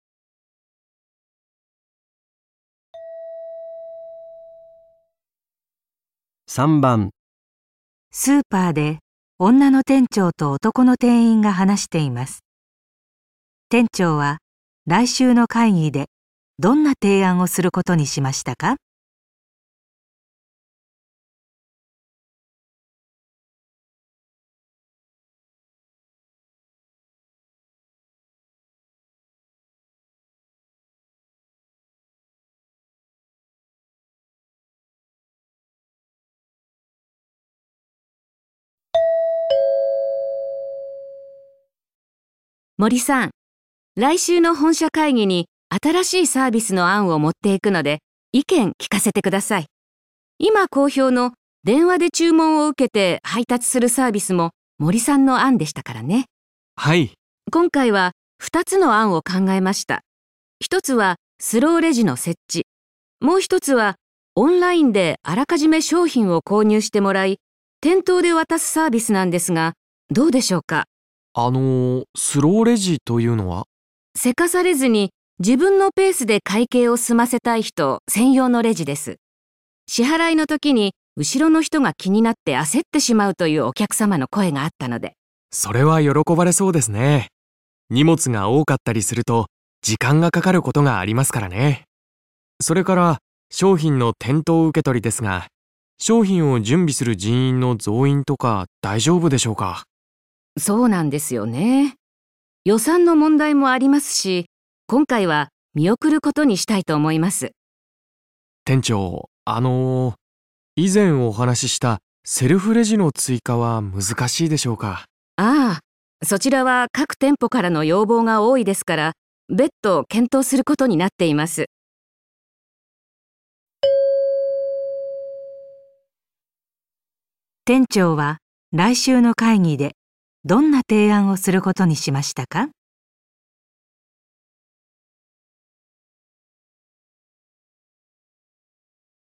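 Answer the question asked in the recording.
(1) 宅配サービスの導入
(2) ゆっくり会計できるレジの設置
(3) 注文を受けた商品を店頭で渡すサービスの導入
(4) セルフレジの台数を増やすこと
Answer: (2) ゆっくり会計できるレジの設置

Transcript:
女:森さん、来週の本社会議に新しいサービスの案を持っていくので意見、聞かせてください。 今好評の電話 で注文を受けて配達するサービスも森さんの案でしたからね。
男:はい。
女:今回は2つの案を考えました。1つはスローレジの設置、 もう1つはオンラインであらかじめ商品を購入してもらい、店頭で渡すサービスなんですが、どうでしょうか?
男:あの、スローレジというのは?
女:急かされずに自分のペースで会計を済ませたい人専用のレジです。 支払いの時に後ろの人が気になって 焦ってしまうというお客様の声があったので。
男:それは喜ばれそうですね。 荷物が多かったりすると時間がかかることがありますからね。 それから、商品の 店頭受け取りですが、 商品を準備する人員の増員とか、大丈夫でしょうか?
女:そうなんですよね。 予算の問題もありますし、 今回は見送ることにしたいと思います。
男 : 店長、 あの、依然お話ししたセルフレジの追加は難しいでしょうか?
女あれそちらは当店様からの改定が多いですから、別は、検討することになっています。
店長は来週の会議でどんな提案をすることにしましたか。

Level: N1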